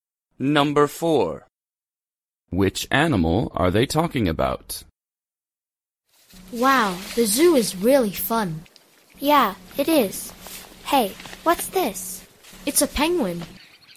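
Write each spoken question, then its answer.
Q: Which animal are they talking about?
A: a penguin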